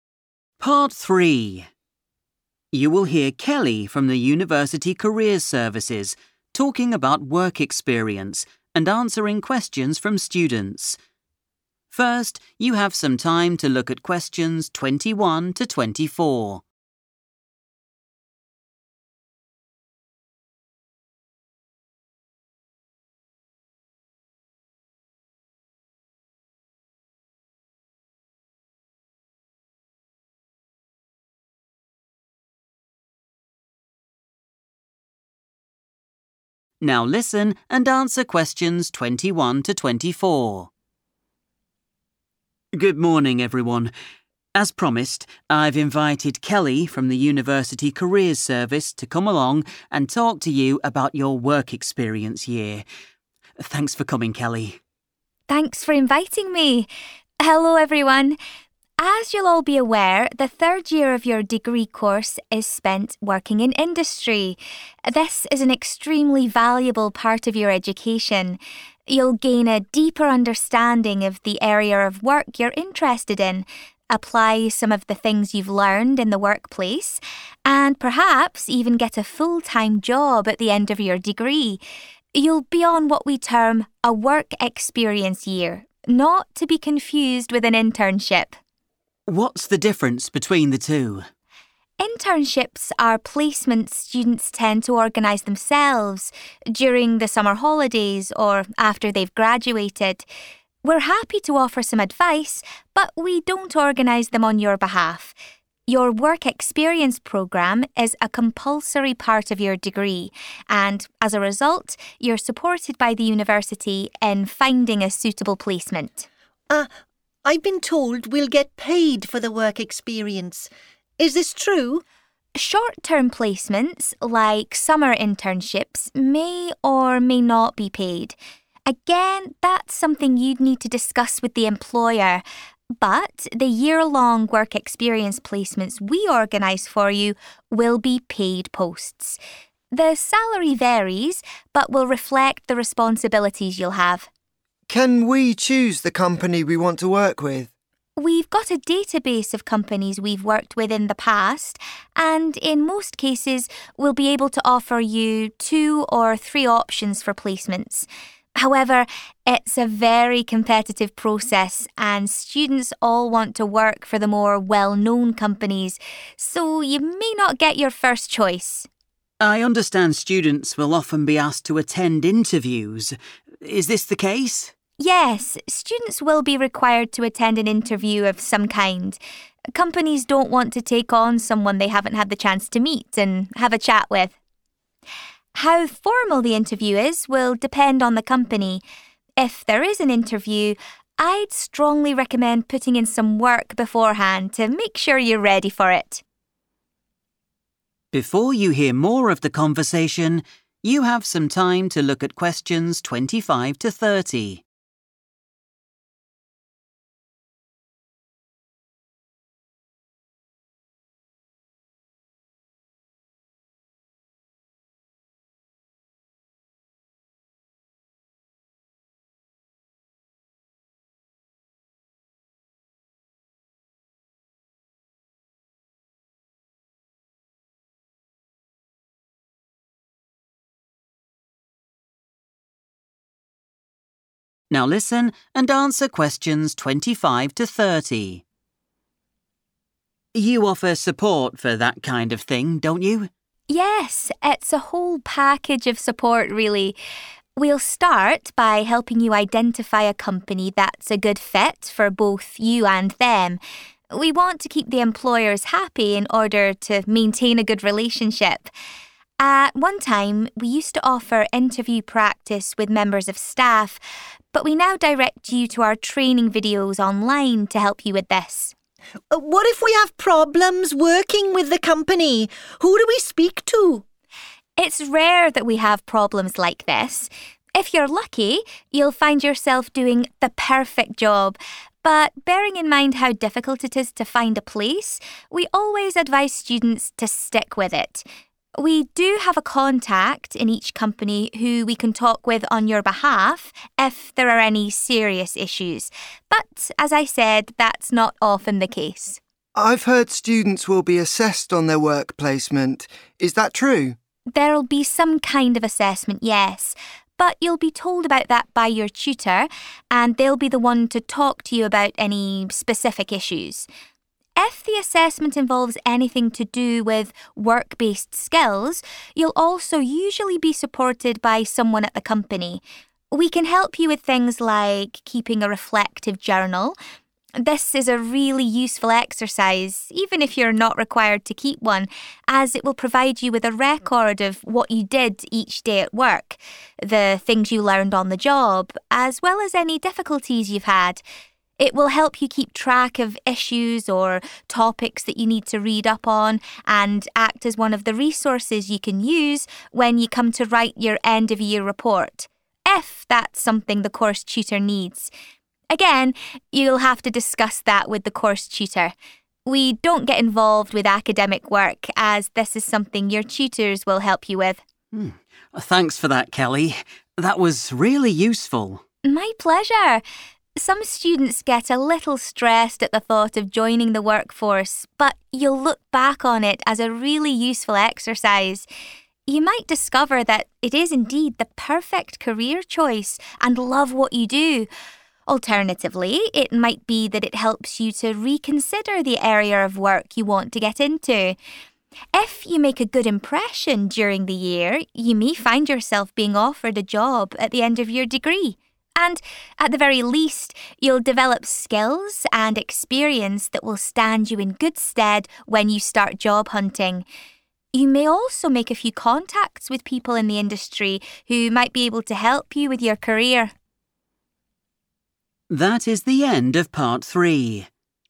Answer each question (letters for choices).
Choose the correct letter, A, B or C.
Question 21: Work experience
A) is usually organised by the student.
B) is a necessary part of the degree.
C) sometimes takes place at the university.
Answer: B

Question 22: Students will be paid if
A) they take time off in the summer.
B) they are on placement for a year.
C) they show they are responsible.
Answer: B

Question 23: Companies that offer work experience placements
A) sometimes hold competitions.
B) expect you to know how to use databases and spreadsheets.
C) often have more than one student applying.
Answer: C

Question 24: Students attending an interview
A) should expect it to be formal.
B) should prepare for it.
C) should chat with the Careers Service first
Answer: B

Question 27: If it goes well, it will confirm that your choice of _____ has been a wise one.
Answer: career

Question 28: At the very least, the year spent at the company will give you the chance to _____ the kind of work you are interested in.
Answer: reconsider

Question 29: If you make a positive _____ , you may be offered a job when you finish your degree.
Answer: impression

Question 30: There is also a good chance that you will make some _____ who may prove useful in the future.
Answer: contacts

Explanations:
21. The correct answer is B because Kelly uses the word 'compulsory' when talking about the work experience programme. In English, 'compulsory' means something that you must do or that is required by a rule. She also explains that the university helps find these jobs because they are a required part of the degree, unlike internships which students usually find on their own.
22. The correct answer is B because the guest speaker, Kelly, specifically mentions that summer placements might not give money, but the university's 'year-long' placements are 'paid posts.' This means a student is guaranteed a 'salary' or payment if they choose the longer work program. Choice A is wrong because summer jobs are not always paid. Choice C is wrong because 'responsibilities' only change how much money someone gets, but the length of the program determines if they get paid at all.
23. The correct answer is correct because Kelly mentions that finding a placement is a 'competitive process.' This competition happens because many students want to work at the famous companies, which means those companies have several students applying for the same positions at once.
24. The correct answer B is proven by Kelly's advice to students. She mentions that companies often want to meet students for an interview. She suggests that students should do some work before the interview happens so that they are ready for the meeting. In English, doing 'work beforehand' to be 'ready' is the same as to 'prepare'.
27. The correct answer is "career" because Kelly explains that spending a year working in industry helps a student decide if they have picked the right job path. In the transcript, she specifically uses the words "perfect career choice" to describe the moment a student realizes they love the work they have chosen.
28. The correct answer is "reconsider" because Kelly mentions that the work experience year is useful regardless of whether it is a perfect match. If a student finds they don't love the job, it provides an opportunity to think again about their career path before they graduate. The summary uses this word to describe one of the possible outcomes of the year in industry for students researching their future interests.
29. The correct answer is 'impression' because Kelly mentions that if a student makes a 'good impression' (which is the same as a 'positive impression') while working, they might be offered a job once their degree is finished. The sentence in the summary closely matches the sentence in the transcript, where 'good' is replaced with its synonym 'positive'.
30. The correct answer is "contacts" because the speaker highlights that meeting people in the industry is a benefit of work experience. These people can offer help or support for your future career, which matches the idea of them being "useful in the future."

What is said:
Lecturer: Good morning, everyone. As promised, I've invited Kelly from the university Careers Service to come along and talk to you about your work experience year. Thanks for coming, Kelly.
Kelly: Thanks for inviting me. Hello everyone. As you'll all be aware, the third year of your degree course is spent working in industry. This is an extremely valuable part of your education. You'll gain a deeper understanding of the area of work you're interested in, apply some of the things you've learned in the workplace, and perhaps even get a full-time job at the end of your degree. You'll be on what we term a "work experience year', not to be confused with an internship.
Lecturer: What's the difference between the two?
Kelly: Internships are placements students tend to organise themselves, during the summer holidays or after they've graduated. We're happy to offer some advice but we don't organise them on your behalf. Your work experience programme is a compulsory part of your degree and as a result, you're supported by the university in finding a suitable placement.
Student 1: I've been told we'll get paid for the work experience. Is this true?
Kelly: Short-term placements, like summer internships, may or may not be paid. Again, that's something you'd need to discuss with the employer. But the year-long work experience placements we organise for you will be paid posts. The salary varies but will reflect the responsibilities you'll have.
Student 2: Can we choose the company we want to work with?
Kelly: We've got a database of companies we've worked with in the past and in most cases, we'll be able to offer you two or three options for placements. However, it's a very competitive process and students all want to work for the more well-known companies so you may not get your first choice.
Lecturer: I understand students will often be asked to attend interviews. Is this the case?
Kelly: Yes, students will be required to attend an interview of some kind. Companies don't want to take on someone they haven't had the chance to meet and have a chat with. How formal the interview is will depend on the company. If there is an interview, I'd strongly recommend putting in some work beforehand to make sure you're ready for it.
Lecturer: You offer support for that kind of thing, don't you?
Kelly: Yes, it's a whole package of support, really. We'll start by helping you identify a company that's a good fit for both you and them. We want to keep the employers happy in order to maintain a good relationship. At one time we used to offer interview practice with members of staff but we now direct you to our training videos online to help you with this.
Student 1: What if we have problems working with the company? Who do we speak to?
Kelly: It's rare that we have problems like this. If you're lucky, you'll find yourself doing the perfect job, but bearing in mind how difficult it is to find a place, we always advise students to stick with it. We do have a contact in each company who we can talk with on your behalf if there are any serious issues, but as I said, that's not often the case.
Student 2: I've heard students will be assessed on their work placement. Is that true?
Kelly: There'll be some kind of assessment, yes, but you'll be told about that by your tutor and they'll be the one to talk to you about any specific issues. If the assessment involves anything to do with work-based skills, you'll also usually be supported by someone at the company. We can help you with things like keeping a reflective journal. This is a really useful exercise even if you're not required to keep one as it will provide you with a record of what you did each day at work, the things you learned on the job as well as any difficulties you've had. It will help you keep track of issues or topics that you need to read up on and act as one of the resources you can use when you come to write your end-of-year report – if that's something the course tutor needs. Again, you'll have to discuss that with the course tutor. We don't get involved with academic work as this is something your tutors will help you with.
Lecturer: Thanks for that, Kelly. That was really useful.
Kelly: My pleasure. Some students get a little stressed at the thought of joining the workforce but you'll look back on it as a really useful exercise. You might discover that it is indeed the perfect career choice and love what you do. Alternatively, it might be that it helps you to reconsider the area of work you want to get into. If you make a good impression during the year, you may find yourself being offered a job at the end of your degree, and at the very least, you'll develop skills and experience that will stand you in good stead when you start job hunting. You may also make a few contacts with people in the industry who might be able to help you with your career.